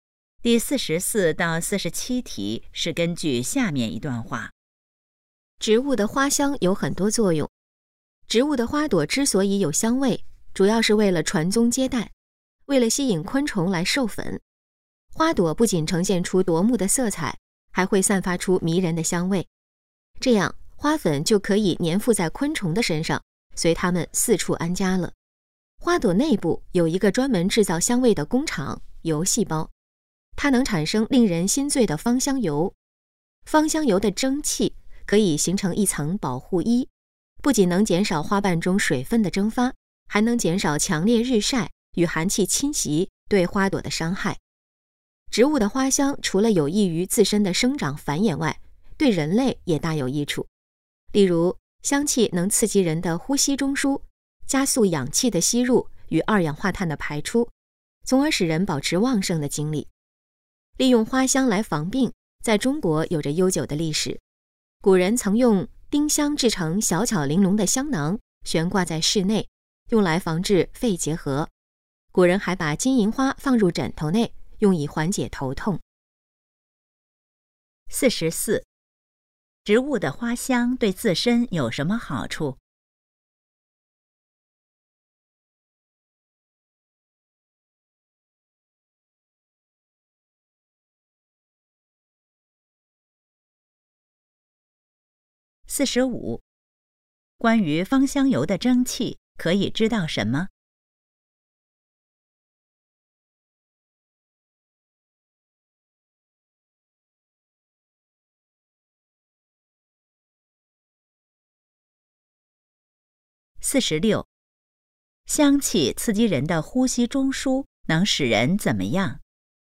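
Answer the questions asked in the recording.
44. 吸引昆虫授粉,传宗接代
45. 能减少花瓣水分蒸发,减少日晒和寒气的伤害
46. 保持旺盛的精力
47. 缓解头痛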